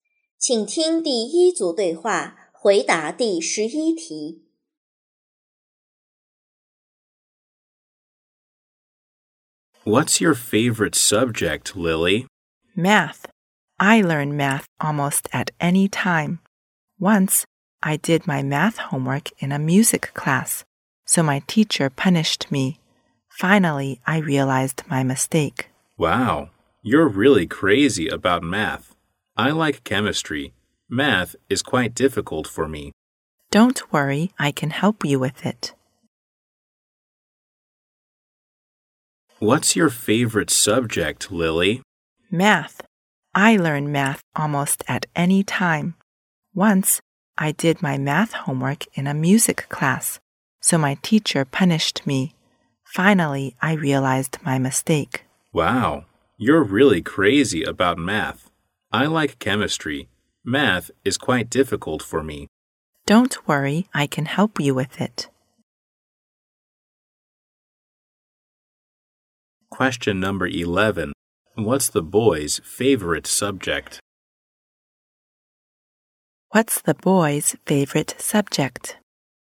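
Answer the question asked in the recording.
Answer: Chemistry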